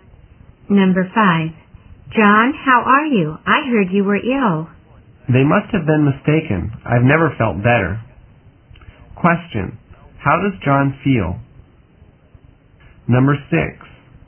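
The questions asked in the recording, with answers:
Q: How does John feel?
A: Very well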